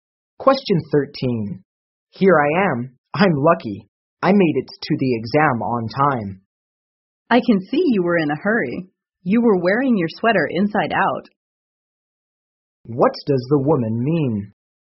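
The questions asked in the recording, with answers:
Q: What does the woman mean?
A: The man was in such a hurry that he wore his sweater inside out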